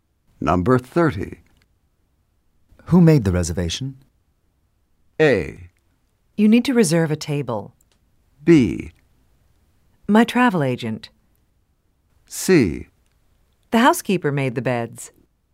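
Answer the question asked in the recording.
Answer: B: My travel agent.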